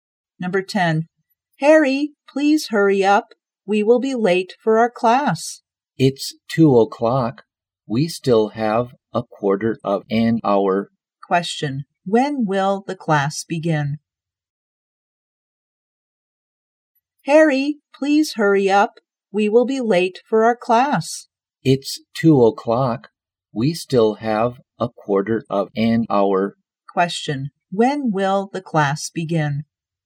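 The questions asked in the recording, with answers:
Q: When will the class begin?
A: At 2:15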